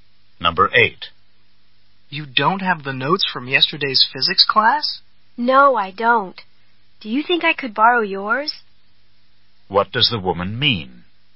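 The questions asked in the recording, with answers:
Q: What does the woman mean?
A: She doesn't have the notes and wants to borrow his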